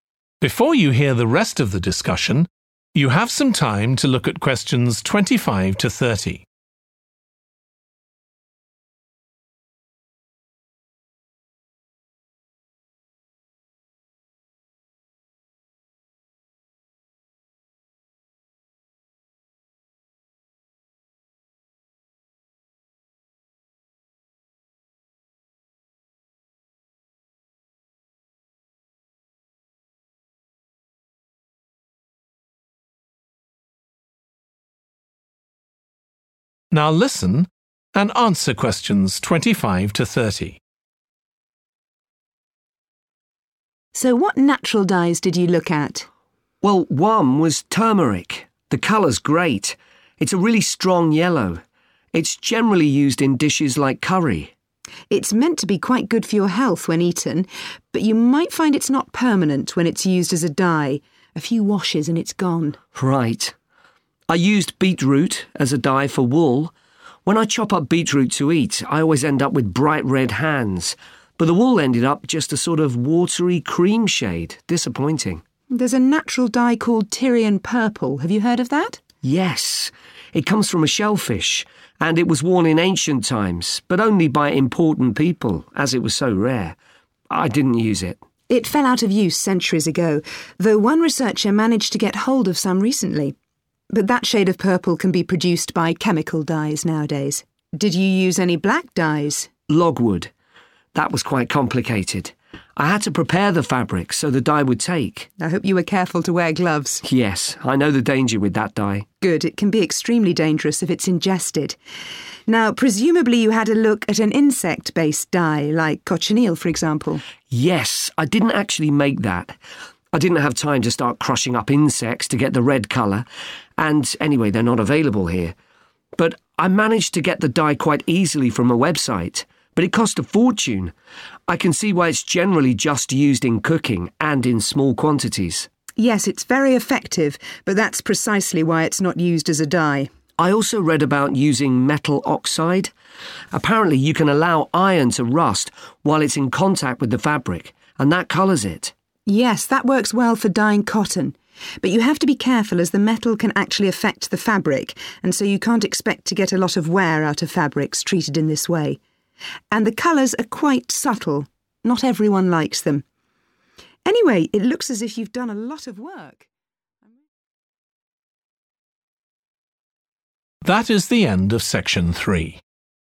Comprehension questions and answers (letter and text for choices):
What problem is identified with each of the following natural dyes?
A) It is expensive.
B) The colour is too strong.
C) The colour is not long-lasting.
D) It is very poisonous.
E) It can damage the fabric.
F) The colour may be unexpected.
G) It is unsuitable for some fabrics.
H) It is not generally available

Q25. turmeric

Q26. beetroot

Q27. Tyrian purple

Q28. logwood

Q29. cochineal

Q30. metal oxide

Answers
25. C) The colour is not long-lasting.
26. F) The colour may be unexpected.
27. H) It is not generally available
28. D) It is very poisonous.
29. A) It is expensive.
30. E) It can damage the fabric.

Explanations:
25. it's not permanent when it's used as a dye – a few washes, and it's gone. Excerpt/Transcript Explanation: The transcript mentions that when turmeric is used as a dye, its color does not last long. After a few washes, the color fades away. Answer Explanation: The answer 'C' indicates that the problem identified with turmeric as a natural dye is that its color is not long-lasting. Reason For Correctness: The correct answer is 'C' because the excerpt clearly states that the color of turmeric, when used as a dye, fades away after a few washes, indicating that it is not permanent. This aligns with the problem of color not being long-lasting as described by option 'C'.
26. but the wool ended up just a sort of watery cream shade. Excerpt/Transcript Explanation: The transcript indicates that the wool turned out to be a very light, almost white color. Answer Explanation: The correct color from using beetroot as a natural dye was different or surprising compared to what was expected. Reason For Correctness: The answer 'F' matches because the outcome of the dyeing process did not result in the color that was anticipated, which aligns with the unexpected color mentioned in the excerpt.
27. The transcript explains that Tyrian purple comes from a shellfish and was rare in ancient times. The speaker mentions not using it. Answer Explanation: The answer indicates that Tyrian purple is not generally available. Reason For Correctness: The correct answer matches because the excerpt mentions that Tyrian purple was rare and only worn by important people, indicating its limited availability, which aligns with the answer choice 'H - It is not generally available.'
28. It can be extremely dangerous if it's ingested Excerpt/Transcript Explanation: The transcript is saying that logwood can be very harmful if someone swallows it. Answer Explanation: The answer means that logwood is very poisonous, which can make people very sick or cause harm if they consume it. Reason For Correctness: The correct answer is 'D' because the excerpt mentions that logwood can be extremely dangerous if ingested, highlighting its poisonous nature.
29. But it cost a fortune. Excerpt/Transcript Explanation: The transcript is saying that something costs a lot of money, meaning it is expensive. Answer Explanation: The answer indicates that the problem identified with cochineal is that it is expensive. Reason For Correctness: The correct answer matches the information in the excerpt as it directly mentions that it 'cost a fortune,' which aligns with the problem of cochineal being expensive.
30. the metal can actually affect the fabric Excerpt/Transcript Explanation: The excerpt means that the metal in the dye can harm the fabric. Answer Explanation: The answer 'E' means that this natural dye can damage the fabric. Reason For Correctness: The correct answer is 'E' because it aligns with the information that the metal in the dye can negatively impact the fabric, indicating that this particular natural dye has the problem of damaging fabrics.

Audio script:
TUTOR: Were you worried about health issues?
JIM: I'd thought if it's a legal food colouring, it must be safe.
TUTOR: Well, it can occasionally cause allergic reactions, I believe.
TUTOR: So what natural dyes did you look at?
JIM: Well, one was turmeric. The colour's great, it's a really strong yellow. It's generally used in dishes like curry.
TUTOR: It's meant to be quite good for your health when eaten, but you might find it's not permanent when it's used as a dye – a few washes, and it's gone.
JIM: Right. I used beetroot as a dye for wool. When I chop up beetroot to eat I always end up with bright red hands, but the wool ended up just a sort of watery cream shade. Disappointing.
TUTOR: There's a natural dye called Tyrian purple. Have you heard of that?
JIM: Yes. It comes from a shellfish, and it was worn in ancient times but only by important people as it was so rare. I didn't use it.
TUTOR: It fell out of use centuries ago, though one researcher managed to get hold of some recently. But that shade of purple can be produced by chemical dyes nowadays. Did you use any black dyes?
JIM: Logwood. That was quite complicated. I had to prepare the fabric so the dye would take.
TUTOR: I hope you were careful to wear gloves.
JIM: Yes. I know the danger with that dye.
TUTOR: Good. It can be extremely dangerous if it's ingested. Now, presumably you had a look at an insect-based dye? Like cochineal, for example?
JIM: Yes. I didn't actually make that, I didn't have time to start crushing up insects to get the red colour and anyway they're not available here, but I managed to get the dye quite easily from a website. But it cost a fortune. I can see why it's generally just used in cooking, and in small quantities.
TUTOR: Yes, it's very effective, but that's precisely why it's not used as a dye.
JIM: I also read about using metal oxide. Apparently you can allow iron to rust while it's in contact with the fabric, and that colours it.
TUTOR: Yes, that works well for dying cotton. But you have to be careful as the metal can actually affect the fabric and so you can't expect to get a lot of wear out of fabrics treated in this way. And the colours are quite subtle, not everyone likes them. Anyway, it looks as if you've done a lot of work ...